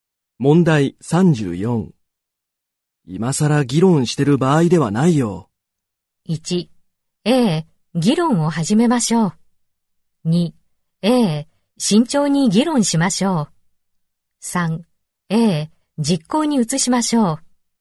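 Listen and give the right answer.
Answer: 3: ええ、実行に移しましょう。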